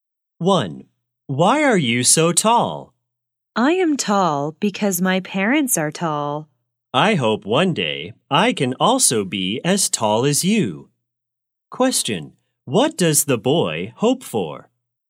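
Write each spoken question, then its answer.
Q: Question, what does the boy hope for?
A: To be as tall as the other person one day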